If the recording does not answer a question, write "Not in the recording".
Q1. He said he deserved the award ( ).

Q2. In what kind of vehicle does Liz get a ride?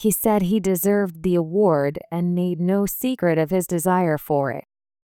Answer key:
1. and made no secret of his desire for it
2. Not in the recording

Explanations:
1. 「make no secret of something」は「~を隠さない、公然と示す」というイディオム的表現です。音声の連結が強く、/meɪnoʊˈsiːkrɪɾəv/のようにつながって聞こえます。「made」の語尾[d]はほぼ脱落します。 このため、語彙力と発音力の両方を駆使しないと聞き取りにくい部分です。

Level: 中級脱出